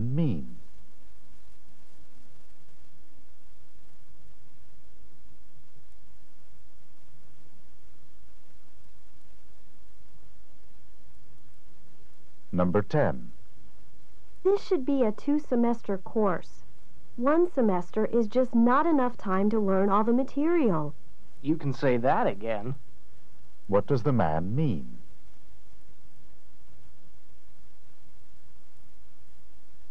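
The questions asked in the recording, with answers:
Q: What does the man mean?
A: He agrees that the course should last two semesters.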